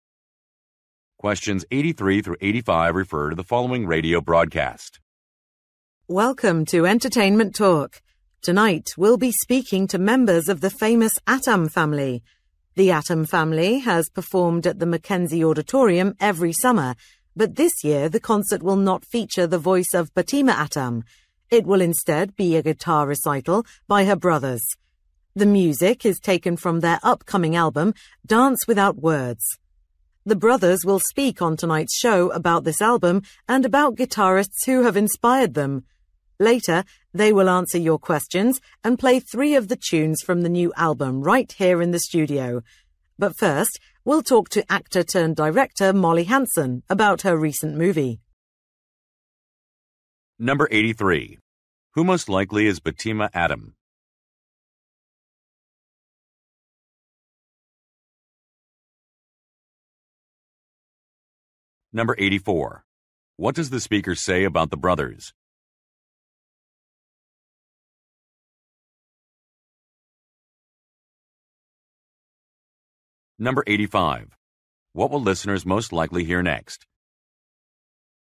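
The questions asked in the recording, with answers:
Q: Who most likely is Fatima Atom?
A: A singer

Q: What will listeners most likely hear next?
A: An interview with Molly Hansen about her movie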